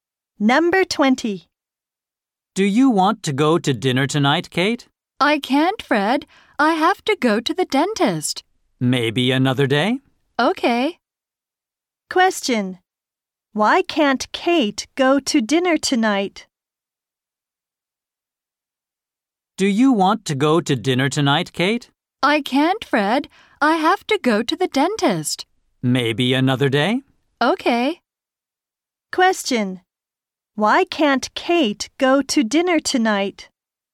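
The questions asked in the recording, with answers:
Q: Why can't Kate go to dinner tonight?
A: She has to go to the dentist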